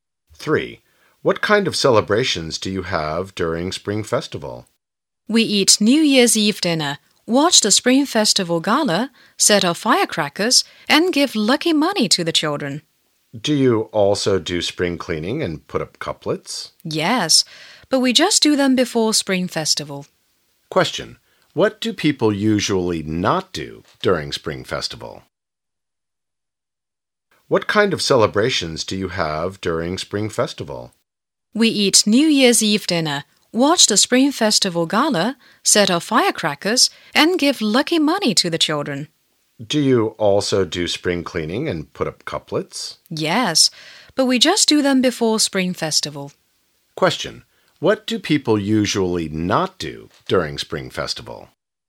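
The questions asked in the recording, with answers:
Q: Question. What do people usually not do during Spring Festival?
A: Spring cleaning and putting up couplets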